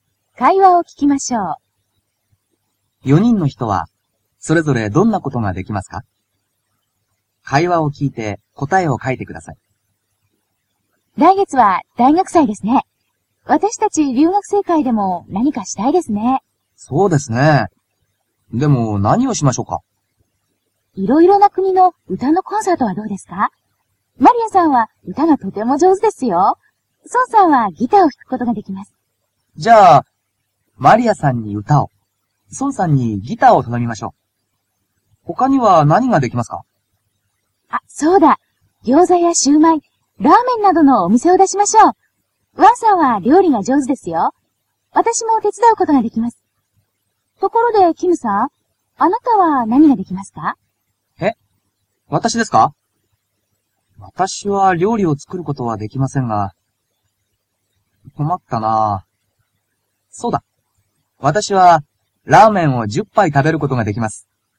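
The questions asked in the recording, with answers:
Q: 4人の人はそれぞれどんなことができますか?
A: マリアさんは歌、ソンさんはギターを弾くこと、ワンさんは料理、キムさんはラーメンを10杯食べること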